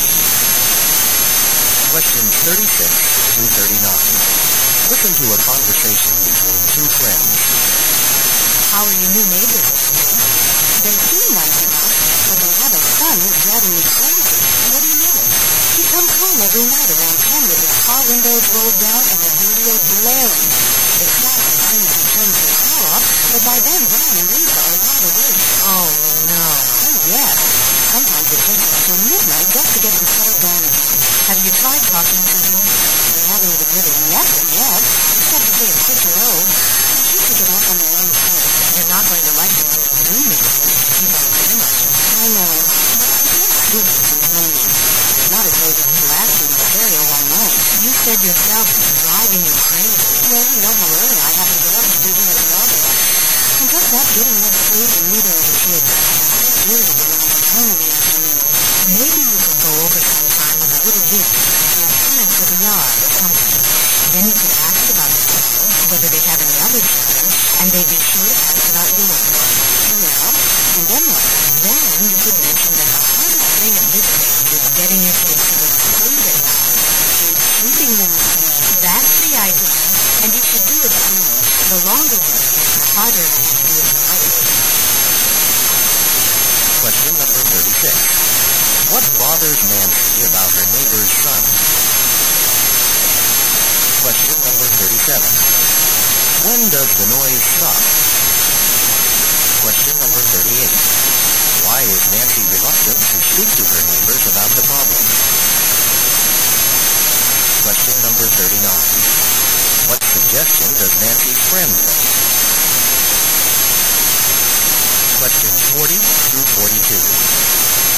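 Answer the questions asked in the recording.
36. His loud car radio at night wakes her children
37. When he turns the car off
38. She feels stupid complaining and hasn't really met them
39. Visit them with a small gift and mention her kids' sleep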